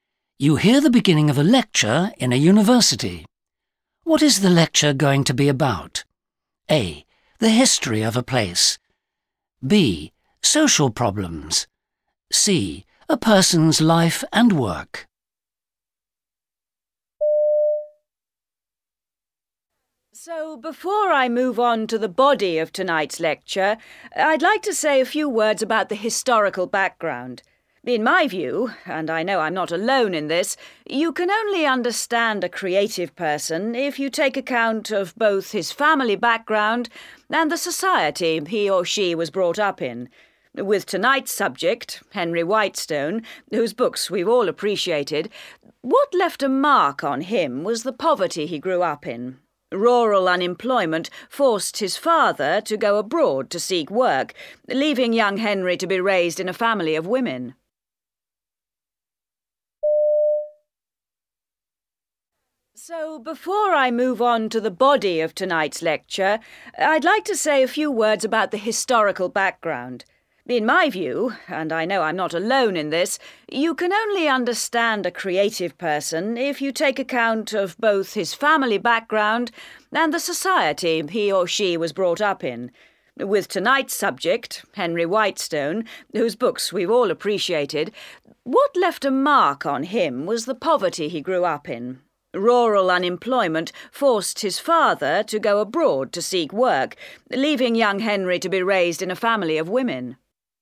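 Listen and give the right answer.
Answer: C: A person's life and work.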